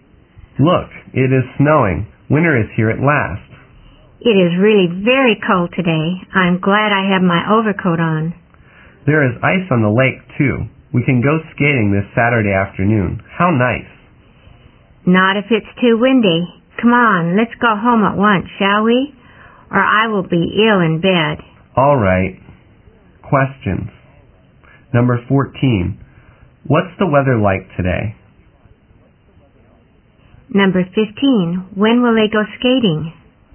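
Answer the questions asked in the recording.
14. It is snowing and very cold.
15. This Saturday afternoon.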